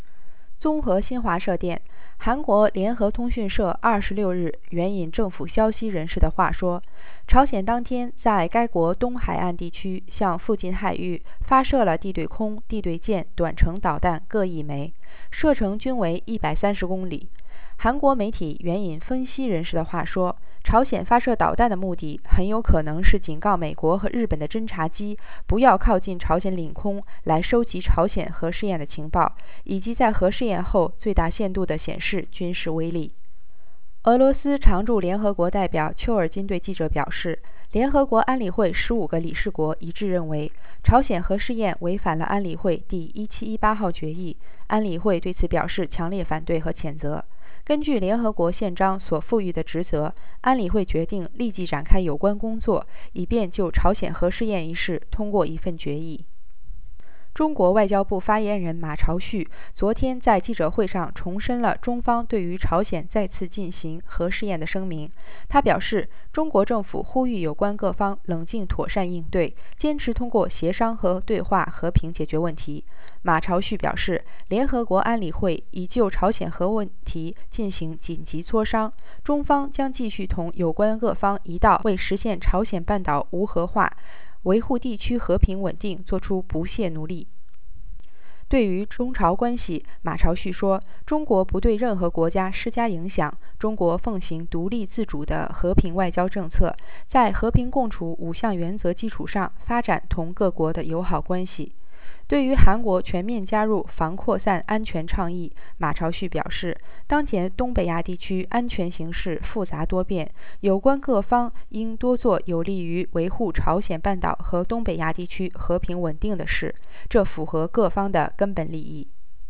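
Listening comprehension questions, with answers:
Please answer the following questions in English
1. 据韩国媒体报道,朝鲜核试验后发射导弹的目的是什么?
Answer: To warn US and Japanese reconnaissance planes not to approach North Korean airspace to gather intelligence on the nuclear test, and to show maximum military power after the test.

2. 丘尔金表示联合国安理会对朝鲜核试验的态度及应对措施是什么?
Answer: All 15 members agreed the test violated Resolution 1718 and strongly opposed and condemned it; the Council decided to start work immediately to pass a resolution on it.

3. 马朝旭表示中方在此次事件中的立场是什么?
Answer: China calls on all parties to respond calmly and properly and to resolve the issue peacefully through consultation and dialogue; it will keep working with others for denuclearization of the Korean Peninsula and regional peace and stability.

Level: 3rd Year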